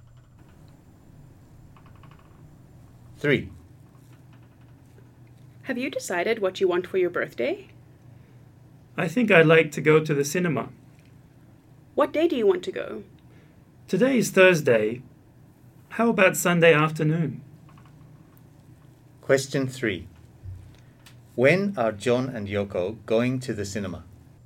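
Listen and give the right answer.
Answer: On Sunday afternoon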